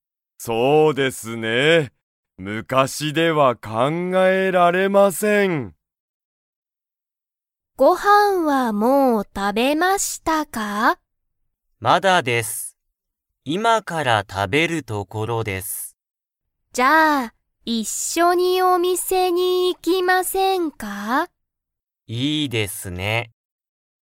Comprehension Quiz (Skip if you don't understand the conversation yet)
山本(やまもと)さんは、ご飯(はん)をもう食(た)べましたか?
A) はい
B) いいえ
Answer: いいえ

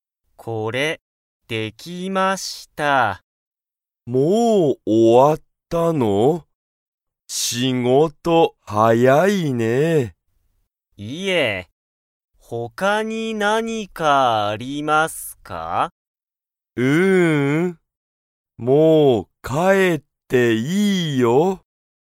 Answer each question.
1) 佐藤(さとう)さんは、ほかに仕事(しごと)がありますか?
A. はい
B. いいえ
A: いいえ

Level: Level 1

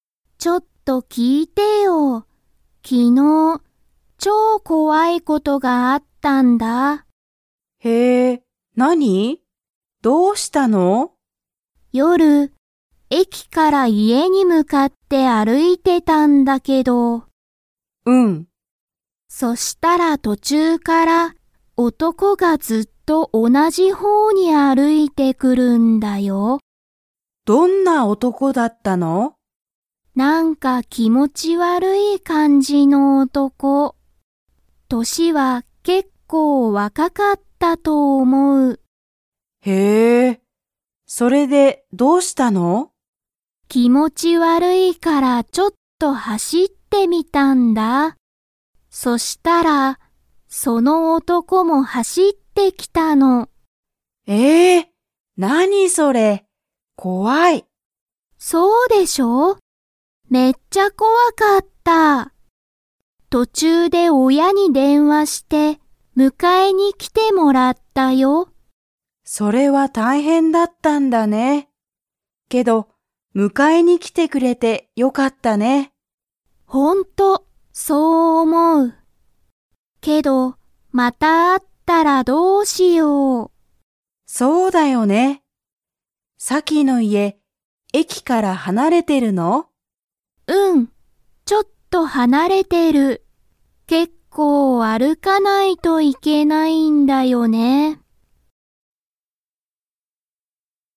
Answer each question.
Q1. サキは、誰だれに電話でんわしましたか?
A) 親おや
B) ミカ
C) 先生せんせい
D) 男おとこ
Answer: 親おや

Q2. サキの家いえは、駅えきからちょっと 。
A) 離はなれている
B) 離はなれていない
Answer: 離はなれている

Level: Level 3

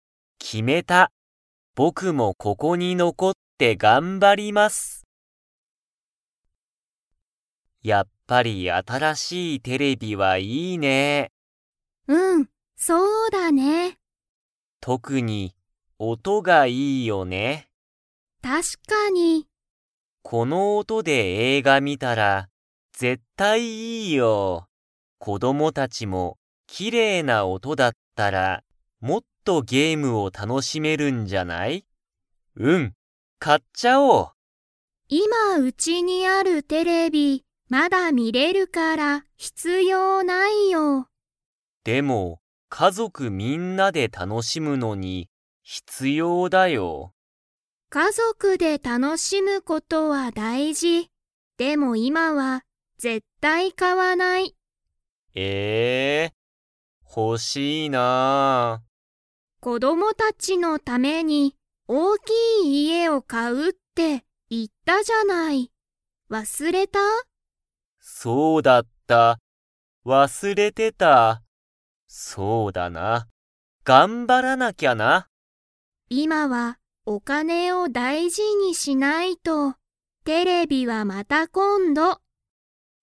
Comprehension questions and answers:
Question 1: 新(あたら)しいテレビは、____がいい。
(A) 子供(こども)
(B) 家族(かぞく)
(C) お金(かね)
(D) 音(おと)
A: 音(おと)

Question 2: エリとサトシは、新(あたら)しいテレビを買(か)いますか?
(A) はい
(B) いいえ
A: いいえ

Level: Level 2

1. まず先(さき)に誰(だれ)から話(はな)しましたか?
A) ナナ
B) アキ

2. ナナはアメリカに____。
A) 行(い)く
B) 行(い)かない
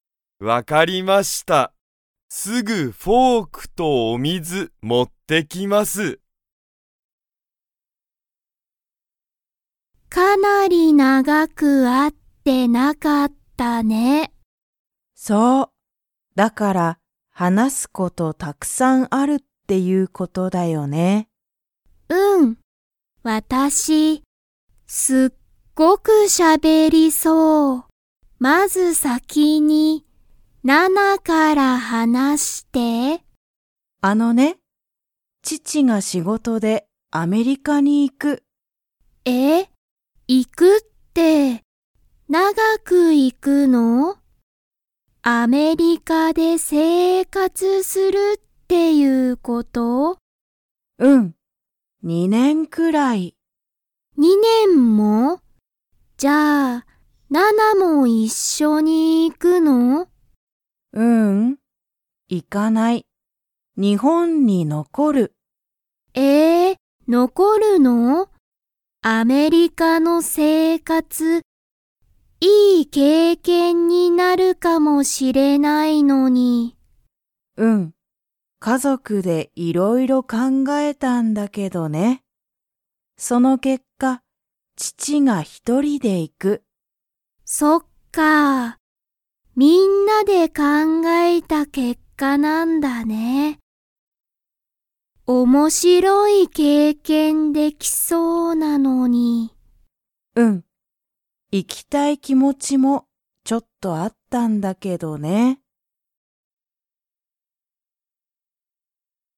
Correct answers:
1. ナナ
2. 行(い)かない

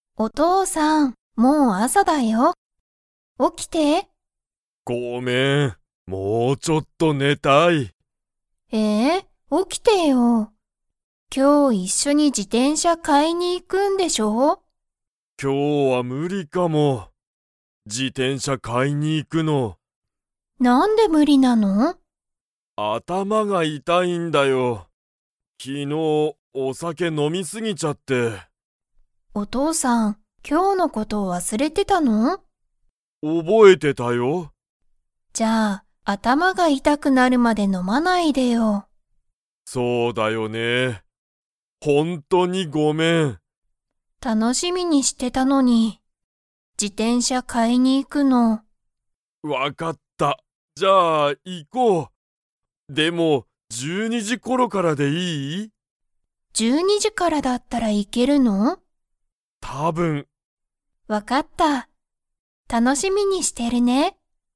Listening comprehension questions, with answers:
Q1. お父とうさんは昨日きのう、何なにをしましたか?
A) 自転車じてんしゃを買かいに行いった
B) 今日きょうの事ことを忘わすれた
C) 電車でんしゃに乗のった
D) お酒さけを飲のみ過すぎた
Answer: お酒さけを飲のみ過すぎた

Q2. このあとお父とうさんは 。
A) 寝ねる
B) 寝ねない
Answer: 寝ねる

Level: Level 3

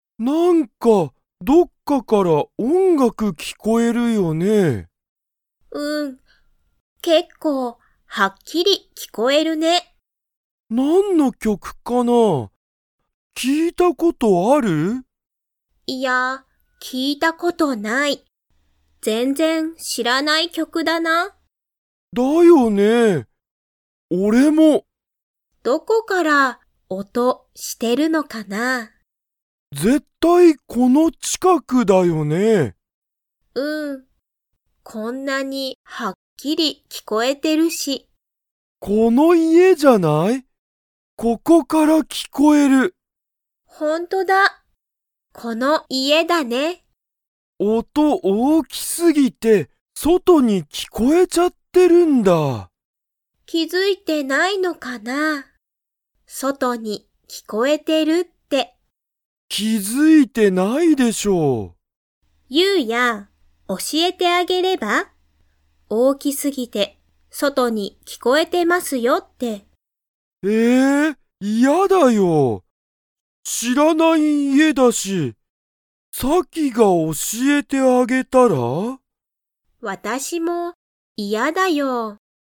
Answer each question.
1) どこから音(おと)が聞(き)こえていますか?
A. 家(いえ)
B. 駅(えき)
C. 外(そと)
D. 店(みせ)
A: 家(いえ)

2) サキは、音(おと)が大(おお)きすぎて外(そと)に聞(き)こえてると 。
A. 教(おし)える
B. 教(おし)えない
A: 教(おし)えない

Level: Level 3

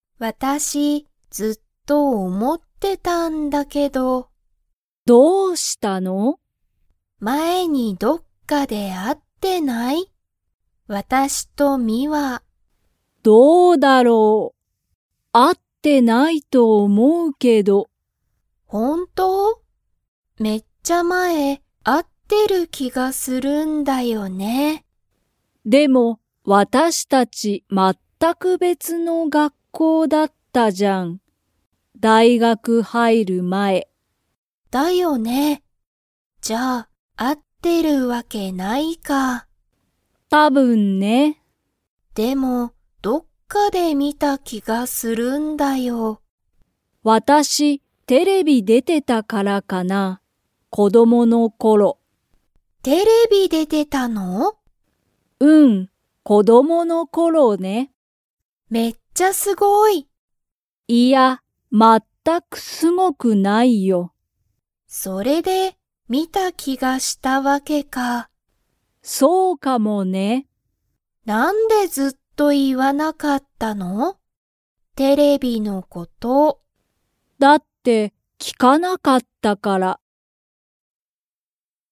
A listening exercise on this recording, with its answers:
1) カナとミワは、大学(だいがく)に入(はい)る前(まえ)、同(おな)じ学校(がっこう)でしたか?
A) はい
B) いいえ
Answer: いいえ

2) ミワは、____の頃(ころ)テレビに出(で)ていた。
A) 大学(だいがく)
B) 子供(こども)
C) 会社かいしゃ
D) 勉強(べんきょう)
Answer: 子供(こども)

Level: Level 2

